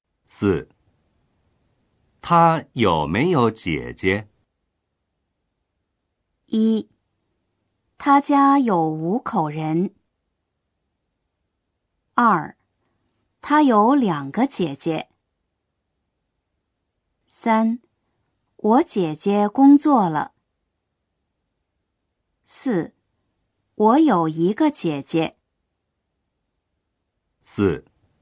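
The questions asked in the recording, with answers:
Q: 他有没有姐姐?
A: 2: 他有两个姐姐。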